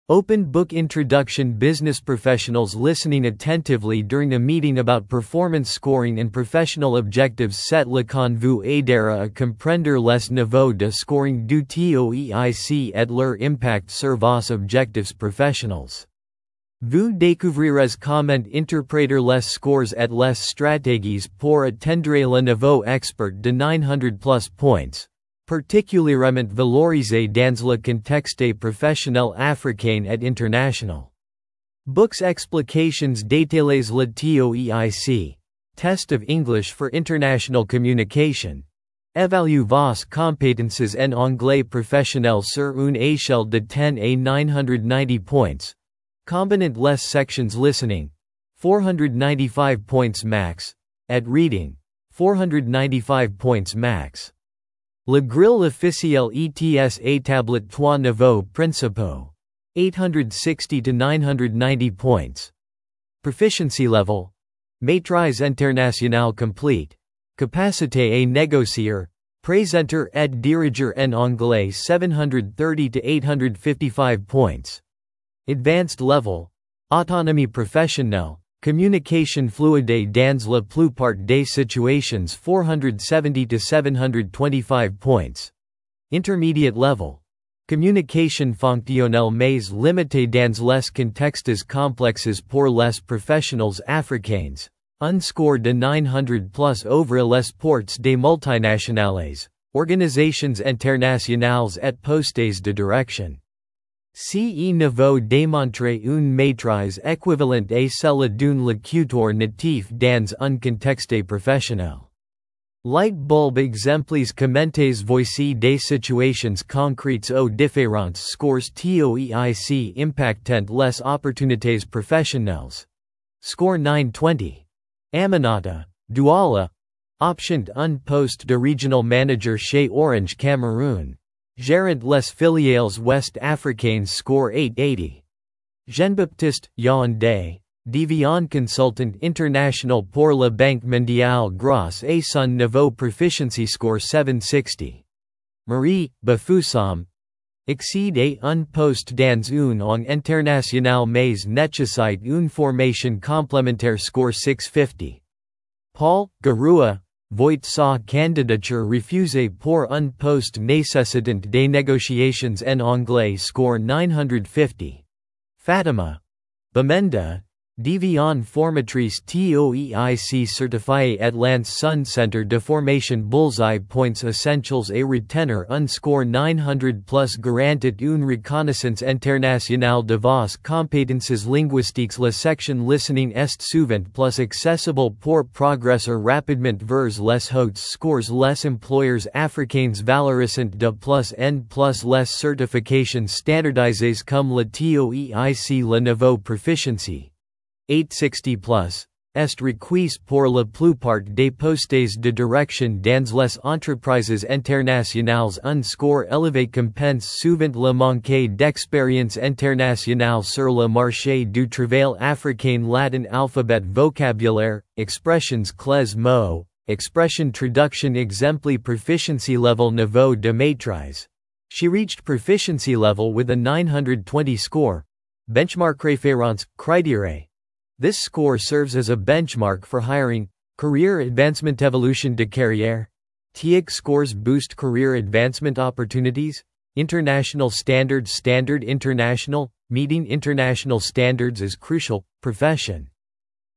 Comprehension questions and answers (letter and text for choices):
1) Quel score TOEIC correspond au niveau "International Proficiency" ?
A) 730+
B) 800+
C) 860+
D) 900+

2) Pour un poste de direction dans une multinationale en Afrique, quel niveau est généralement exigé ?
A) Intermediate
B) Advanced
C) Proficiency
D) Peu importe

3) Le score TOEIC maximum possible est de :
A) 900 points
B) 950 points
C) 990 points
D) 1000 points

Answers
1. C) 860+
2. C) Proficiency
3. C) 990 points